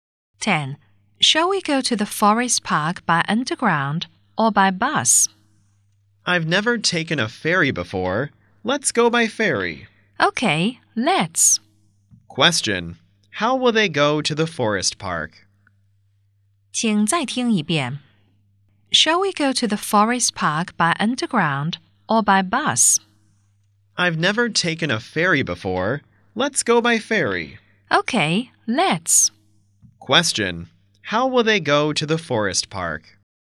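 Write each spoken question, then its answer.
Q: How will they go to the forest park?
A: By ferry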